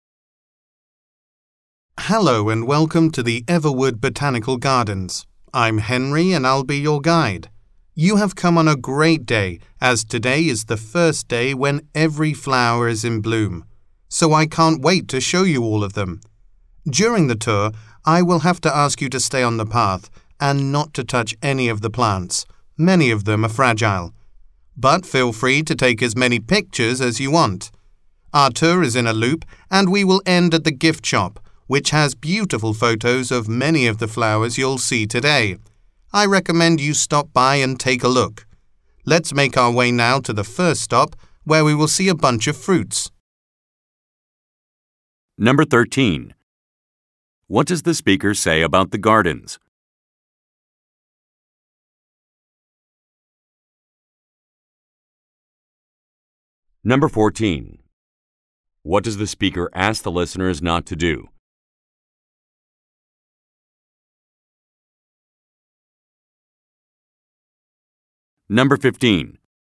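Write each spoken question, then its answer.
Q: What does the speaker say about the gardens?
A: Every flower is in bloom today, for the first time.

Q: What does the speaker ask the listeners not to do?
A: Touch any of the plants (or leave the path).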